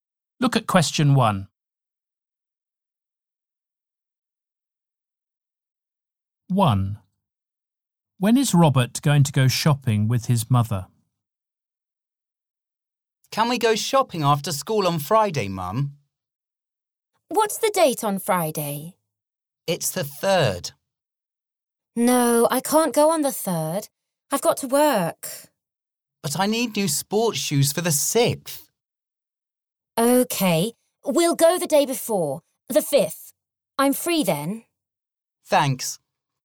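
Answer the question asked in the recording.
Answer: On the 5th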